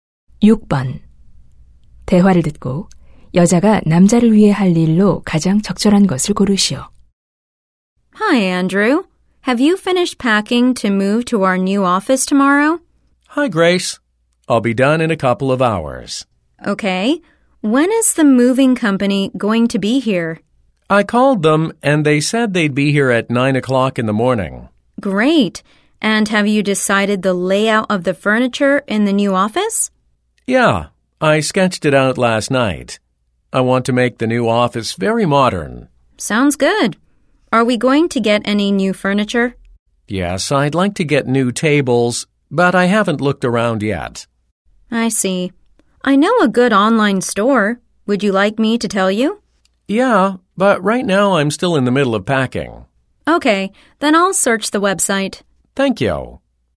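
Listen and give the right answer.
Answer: 가구 온라인 매장 검색하기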